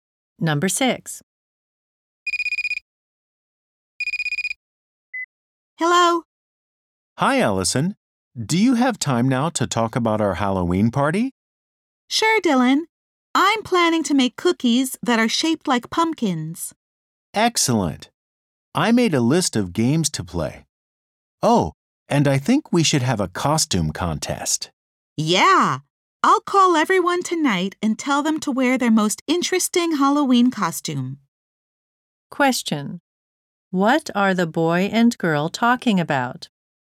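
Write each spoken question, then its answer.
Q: What are the boy and girl talking about?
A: Plans for their Halloween party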